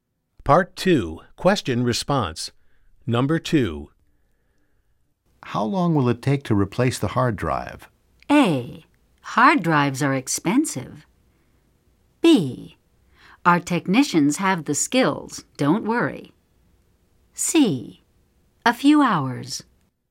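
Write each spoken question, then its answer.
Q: How long will it take to replace the hard drive?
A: C: A few hours.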